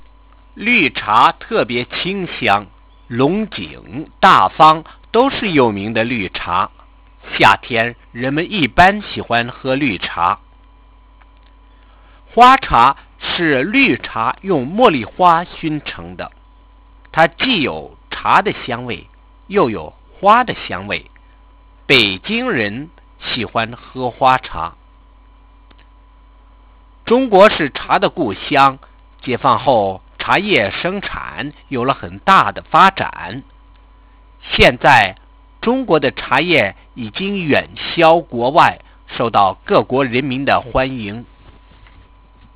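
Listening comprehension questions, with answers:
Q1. Describe how the scented tea is made.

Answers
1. It is green tea scented (smoked) with jasmine flowers.

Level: Second year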